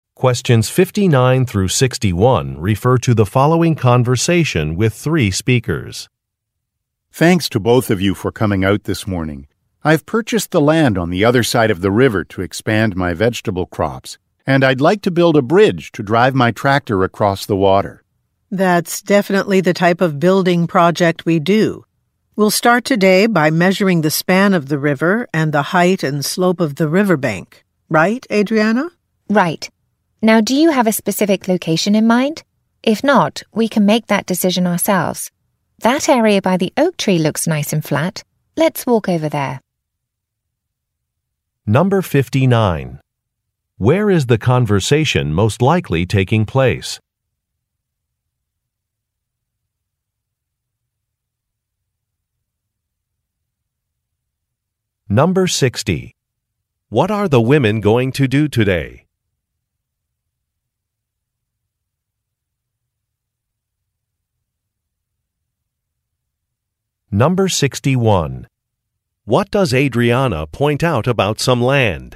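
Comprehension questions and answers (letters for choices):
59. Where is the conversation most likely taking place?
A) At a zoo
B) At a beach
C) At a park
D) At a farm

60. What are the women going to do today?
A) Take some measurements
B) Pour some concrete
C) Calculate a price estimate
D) Clear some trees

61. What does Adriana point out about some land?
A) It is dry.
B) It is flat.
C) It is sandy.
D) It is surrounded by a fence.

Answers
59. D
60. A
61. B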